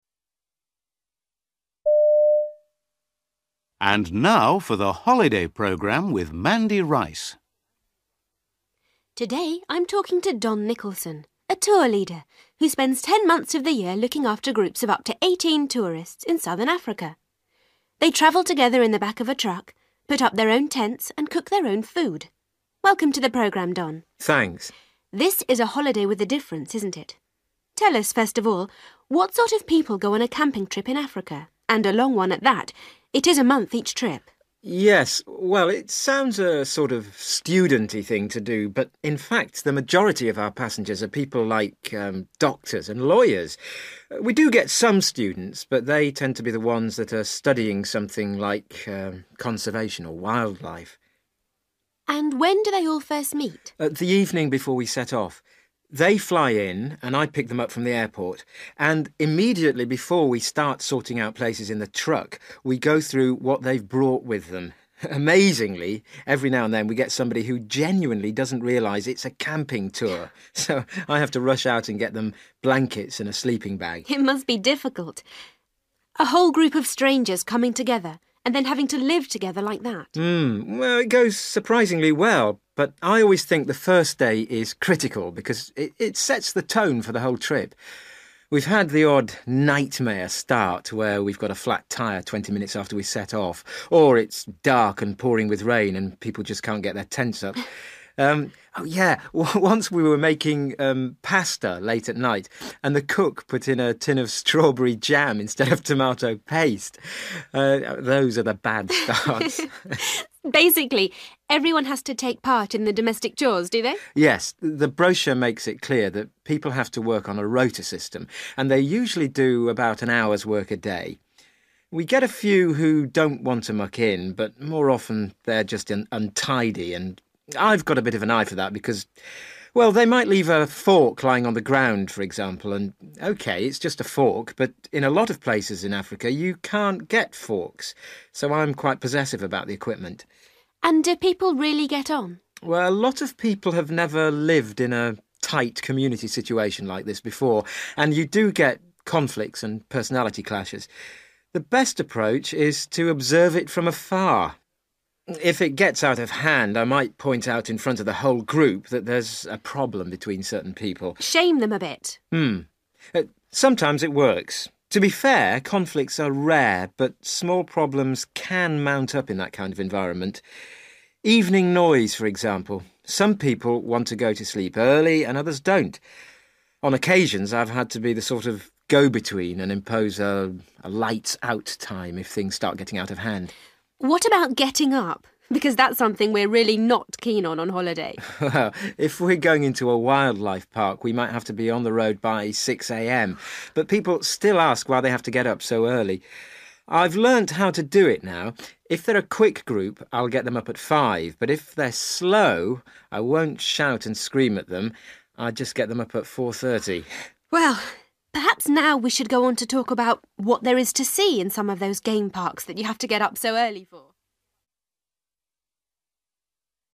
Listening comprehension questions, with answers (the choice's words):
For questions 24-30, choose the best answer (A, B or C).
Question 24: Don says that most of his passengers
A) are not students.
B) are looking for jobs.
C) work in conservation.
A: are not students.

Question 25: When Don first meets a group, he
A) gives them blankets for the overnight trip.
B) shows them where to sit on the truck.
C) checks they have the right equipment.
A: checks they have the right equipment.

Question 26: Don remembers one trip when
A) he failed to take enough food.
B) someone made a mistake with the food.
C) someone complained about the food.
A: someone made a mistake with the food.

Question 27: Don oversees the domestic work because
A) he doesn't like to lose things.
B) it has to be done within an hour.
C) people complain if things are dirty.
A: he doesn't like to lose things.

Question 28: If people argue, Don says that he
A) prefers not to get involved.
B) separates the people concerned.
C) asks the group for a solution.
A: prefers not to get involved.

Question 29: Don says that he sometimes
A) needs to get to sleep early.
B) has to camp in a noisy area.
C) tells people when to go to bed.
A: tells people when to go to bed.

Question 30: What does Don say about getting up?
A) He ignores any complaints about the time.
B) He varies his schedule according to the group.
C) He forces everyone to be quick about it.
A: He varies his schedule according to the group.

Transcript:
Announcer: And now for The Holiday Programme with Mandy Rice.
Mandy: Today I'm talking to Don Nicholson, a tour leader who spends ten months of the year looking after groups of up to eighteen tourists in southern Africa. They travel together in the back of a truck, put up their own tents and cook their own food. Welcome to the programme, Don.
Don: Thanks.
Mandy: This is a holiday with a difference, isn't it? Tell us, first of all, what sort of people go on a camping trip in Africa ... and a long one at that ... it is a month each trip?
Don: Yes. Well it sounds a sort of students thing to do, but in fact the majority of our passengers are people like doctors and lawyers. We do get some students but they tend to be ones that are studying something like conservation or wildlife.
Mandy: And when do they all first meet?
Don: The evening before we set off. They fly in and I pick them up from the airport and immediately before we start sorting out places in the truck we go through what they've brought with them. Amazingly, every now and then we get somebody who genuinely doesn't realise it's a camping tour, so I have to rush out and get them blankets and a sleeping bag.
Mandy: It must be difficult – a whole group of strangers coming together and then having to live together like that.
It goes surprisingly well, but I always think the first day is critical because it sets the tone for the whole trip. We've had the odd nightmare start where we've got a flat tyre twenty minutes after we set off or it's dark and pouring with rain and people just can't get their tents up. Yeah, once we were making pasta late at night and the cook put in a tin of strawberry jam instead of tomato paste – those are the bad starts!
Mandy: Basically everyone has to take part in the domestic chores, do they?
Don: Yes. The brochure makes it clear that people have to work on a rota system and they usually do about an hour's work a day. We get a few who don't want to muck in but more often they are just untidy and I've got a bit of an eye for that because ... well, they might leave a fork lying on the ground, for example, and okay, it's just a fork, but in a lot of places in Africa you can't get forks, so I'm quite possessive about the equipment.
Mandy: And do people really get on?
Don: A lot of people have never lived in a tight community situation like this before and you do get conflicts and personality clashes. The best approach is to observe it from afar. If it gets out of hand, I might point out in front of the whole group that there's a problem between certain people.
Mandy: Shame them a bit ...
Sometimes it works. To be air, conflicts are rare but small problems can mount up in that kind of environment. Evening noise, for example. Some people want to go to sleep early and others don't. On occasions I've had to be the sort of go-between and impose a 'lights out' time if things start getting out of hand.
Mandy: What about getting up, because that's something we're really not keen on on holiday?
Don: If we're going into a wildlife park we might have to be on the road by six a.m. but people still ask why they have to get up so early. I've learnt how to do it now. If they're a quick group I'll get them up at five, but if they're slow I won't shout and scream at them – I just get them up at four thirty.
Mandy: Well, perhaps now we should go on to talk about what there is to see in some of those game parks that you have to get up so early for.